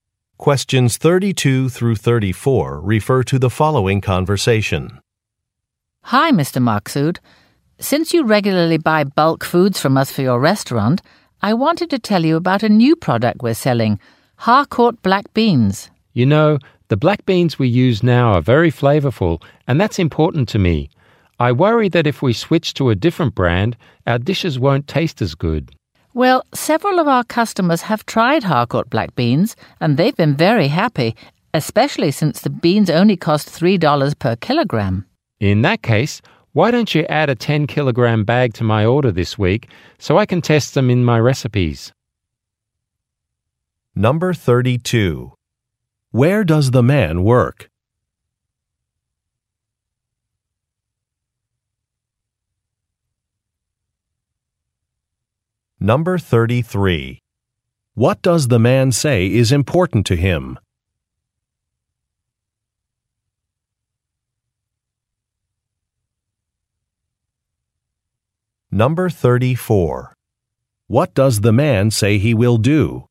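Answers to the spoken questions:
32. At a restaurant
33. The flavor of the beans
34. Try the new beans in his recipes (order a 10-kilogram bag to test them)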